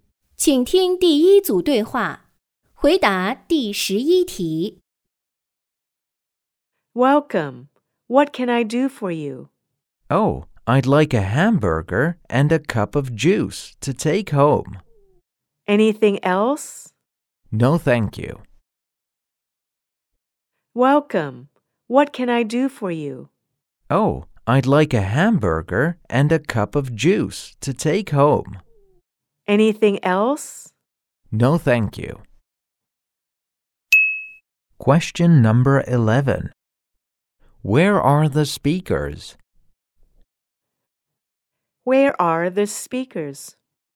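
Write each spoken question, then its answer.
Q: Where are the speakers?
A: In a fast food restaurant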